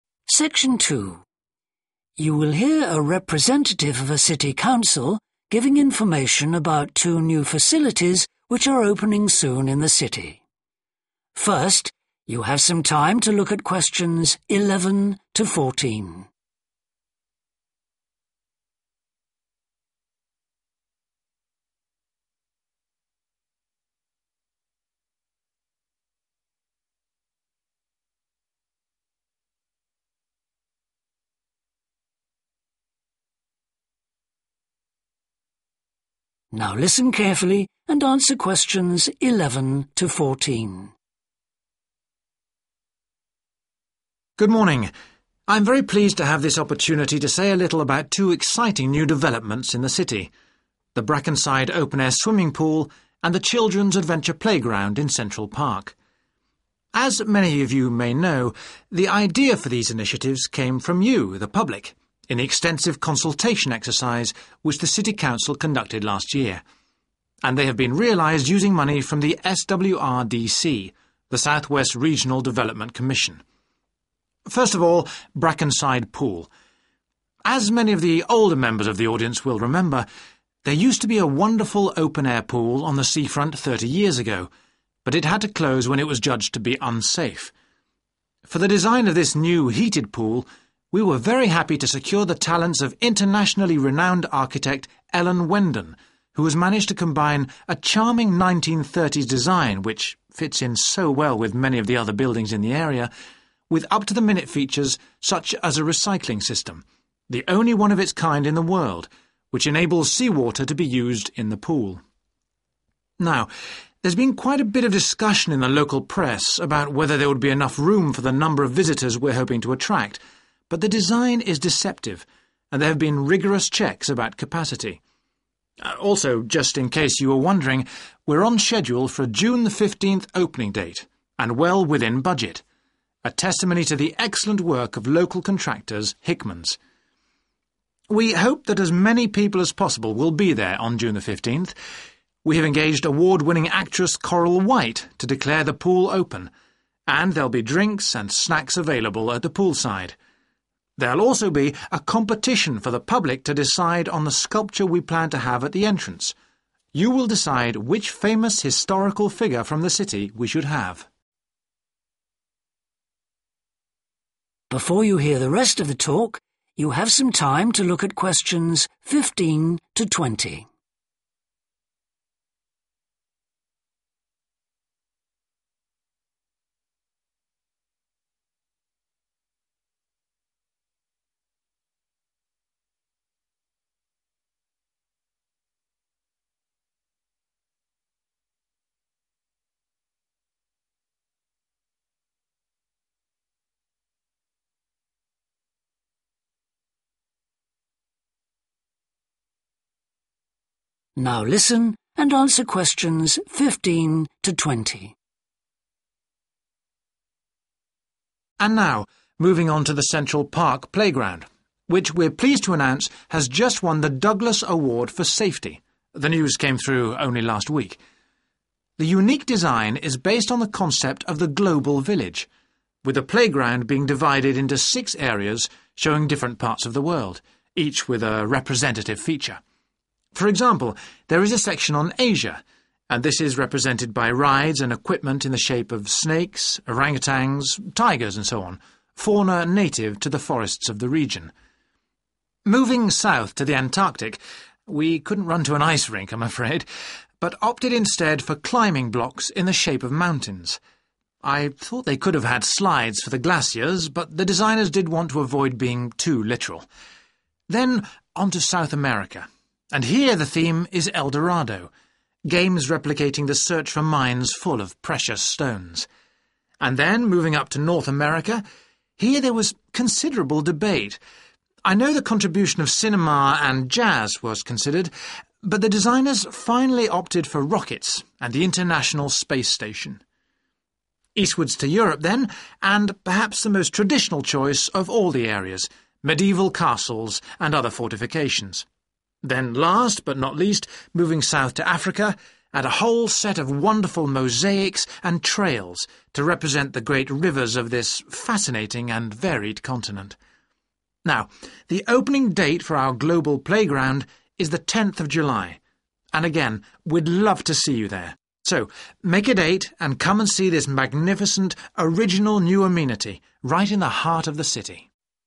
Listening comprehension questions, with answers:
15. Asia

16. Antarctica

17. South America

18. North America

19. Europe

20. Africa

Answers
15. E. local animals
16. F. mountains
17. D. jewels
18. H. space travel
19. A. ancient forts
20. B. waterways

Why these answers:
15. For example, there is a section on Asia, and this is represented by rides and equipment in the shape of snakes, orang-utans, tigers and so on – fauna native to the forests of the region (= local animals => E) [và điều này được thể hiện bằng việc cưỡi ngựa và thiết bị có hình rắn, đười ươi, hổ, v.v. – những loài động vật có nguồn gốc từ các khu rừng trong khu vực].
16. Moving south to the Antarctic – we couldn't run to an ice rink I'm afraid but opted instead for climbing blocks in the shape of mountains (= mountains => F) [leo các khối có hình ngọn núi]
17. Then on to South America – and here the theme is El Dorado – games replicating the search for mines full of precious stones (= jewels => D) [El Dorado – trò chơi mô phỏng cuộc tìm kiếm các mỏ chứa đầy đá quý].
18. I know the contribution of cinema and jazz was considered but the designers finally opted for rockets and the international Space Station (= space travel => H) [tên lửa và Trạm vũ trụ quốc tế].
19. medieval castles and other fortifications (= ancient forts => A) [lâu đài thời trung cổ và các công sự khác].
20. Then last, but not least, moving south to Africa and a whole set of wonderful mosaics and trails to represent the great rivers (= waterways => B) of this fascinating and varied continent [đại diện cho những con sông lớn của lục địa hấp dẫn và đa dạng này].